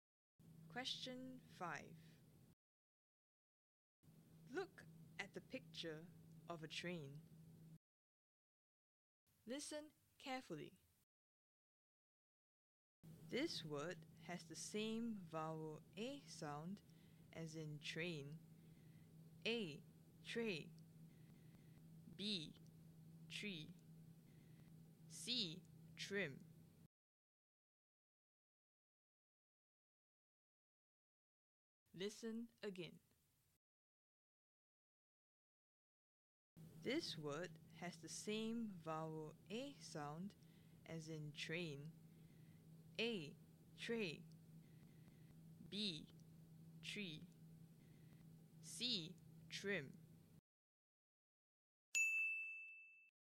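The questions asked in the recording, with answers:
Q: This word has the same vowel A sound as in train.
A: A: Tray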